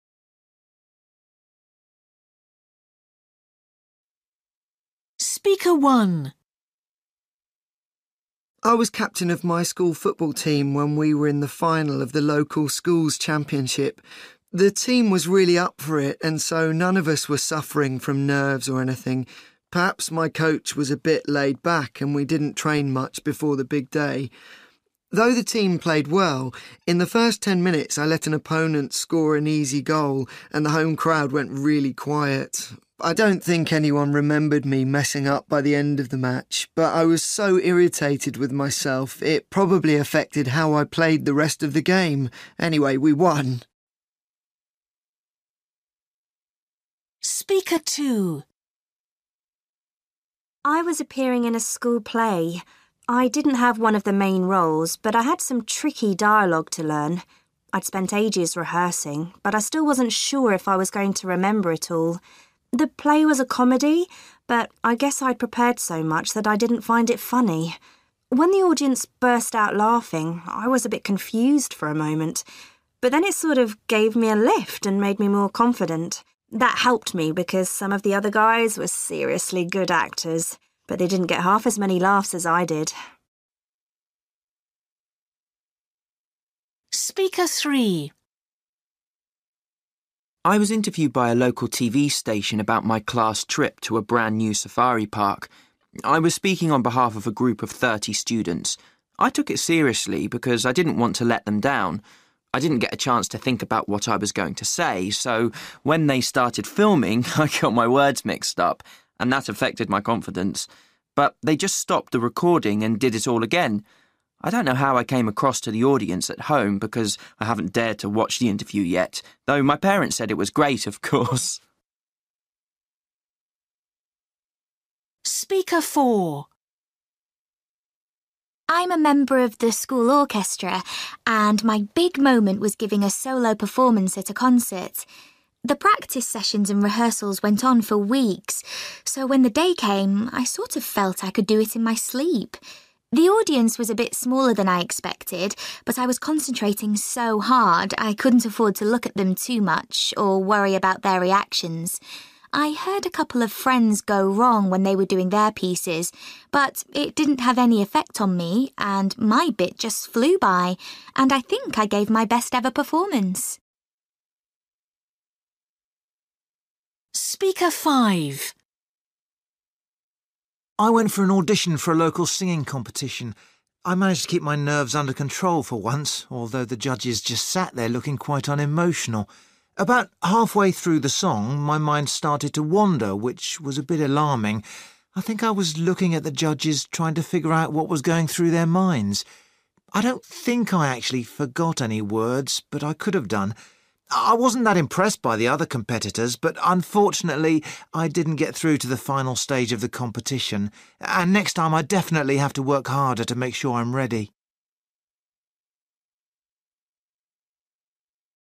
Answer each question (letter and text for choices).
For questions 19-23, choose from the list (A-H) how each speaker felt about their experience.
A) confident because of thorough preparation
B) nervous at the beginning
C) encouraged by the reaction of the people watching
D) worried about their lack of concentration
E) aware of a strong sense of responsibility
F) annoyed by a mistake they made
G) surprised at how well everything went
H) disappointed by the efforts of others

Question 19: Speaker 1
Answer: F) annoyed by a mistake they made

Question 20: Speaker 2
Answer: C) encouraged by the reaction of the people watching

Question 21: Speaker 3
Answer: E) aware of a strong sense of responsibility

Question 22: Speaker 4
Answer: A) confident because of thorough preparation

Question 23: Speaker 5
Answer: D) worried about their lack of concentration

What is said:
Boy: I was captain of my school football team when we were in the final of the local schools championship. The team was really up for it and so none of us were suffering from nerves or anything. Perhaps my coach was a bit laid-back and we didn't train much before the big day. Though the team played well, in the first ten minutes I let an opponent score an easy goal and the home crowd went really quiet! I don't think anyone remembered me messing up by the end of the match, but I was so irritated with myself, it probably affected how I played the rest of the game. Anyway, we won!
Girl: I was appearing in a school play. I didn't have one of the main roles, but I had some tricky dialogue to learn. I'd spent ages rehearsing, but I still wasn't sure if I was going to remember it all. The play was a comedy, but I guess I'd prepared so much that I didn't find it funny. When the audience burst out laughing, I was a bit confused for a moment, but then it sort of gave me a lift and made me more confident. That helped me because some of the other guys were seriously good actors, but they didn't get half as many laughs as I did.
Boy: I was interviewed by a local TV station about my class trip to a brand new safari park. I was speaking on behalf of a group of thirty students. I took it seriously because I didn't want to let them down. I didn't get a chance to think about what I was going to say. So when they started filming, I got my words mixed up and that affected my confidence. But they just stopped the recording and did it all again. I don't know how I came across to the audience at home because I haven't dared to watch the interview yet, though my parents said it was great, of course!
Girl: I'm a member of the school orchestra and my big moment was giving a solo performance at a concert. The practice sessions and rehearsals went on for weeks, so when the day came, I sort of felt I could do it in my sleep. The audience was a bit smaller than I expected, but I was concentrating so hard I couldn't afford to look at them too much or worry about their reactions. I heard a couple of friends go wrong when they were doing their pieces, but it didn't have any effect on me and my big just flew by and I think I gave my best ever performance.
Boy: I went for an audition for a local singing competition. I managed to keep my nerves under control for once, although the judges just sat there looking quite unemotional. About halfway through the song, my mind started to wander, which was a bit alarming – I think I was looking at the judges, trying to figure out what was going through their minds. I don't think I actually forgot any words, but I could've done. I wasn't that impressed by the other competitors, but unfortunately, I didn't get through to the final stage of the competition and next time I definitely have to work harder to make sure I'm ready.